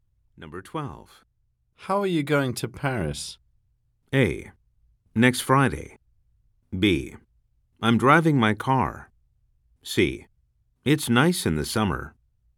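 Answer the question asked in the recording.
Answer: B: I'm driving my car.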